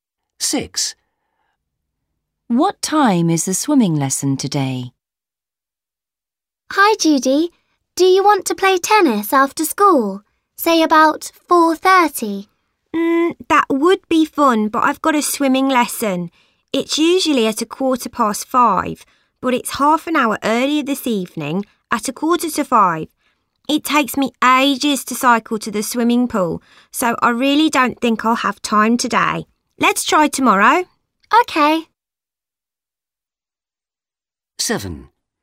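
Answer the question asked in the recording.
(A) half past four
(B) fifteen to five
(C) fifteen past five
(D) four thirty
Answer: (B) fifteen to five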